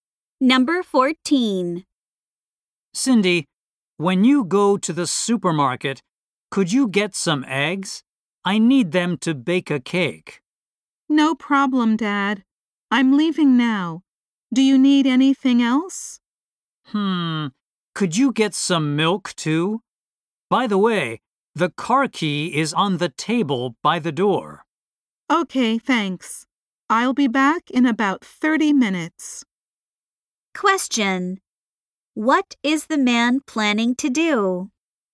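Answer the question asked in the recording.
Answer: Bake a cake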